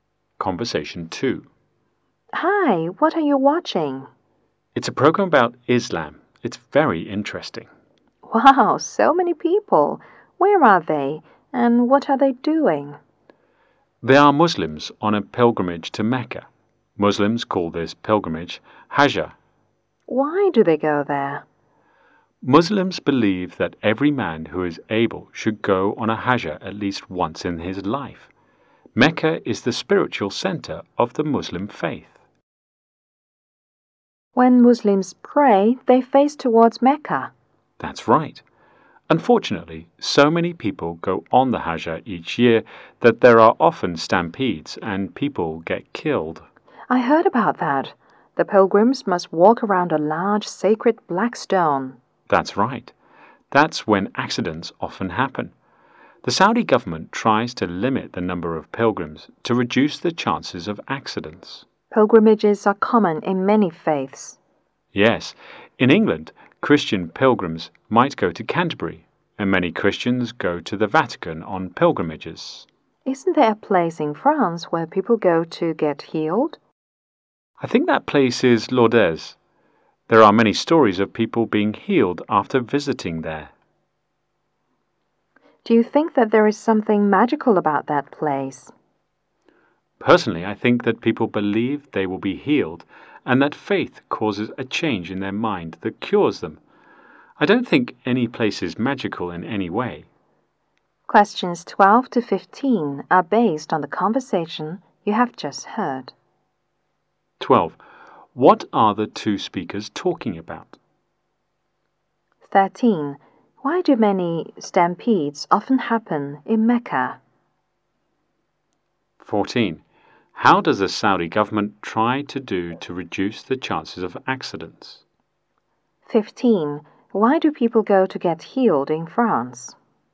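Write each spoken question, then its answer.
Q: What are the two speakers talking about?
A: Pilgrimages, such as the Muslim Hajj to Mecca

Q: Why do many stampedes often happen in Mecca?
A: So many people go on the Hajj each year

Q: How does the Saudi government try to do to reduce the chances of accidents?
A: It limits the number of pilgrims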